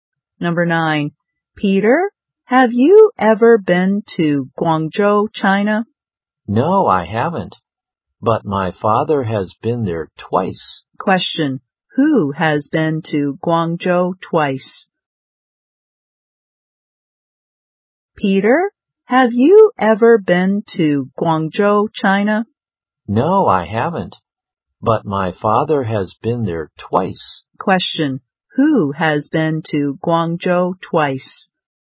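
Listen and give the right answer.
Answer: Peter's father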